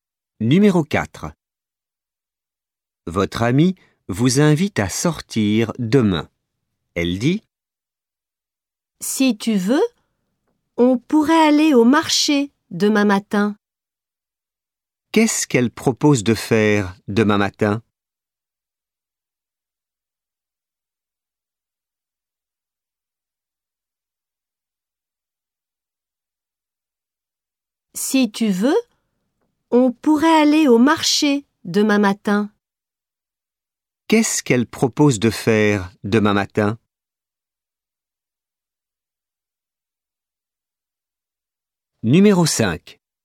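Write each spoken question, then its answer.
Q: Qu'est-ce qu'elle propose de faire demain matin ?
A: Aller au marché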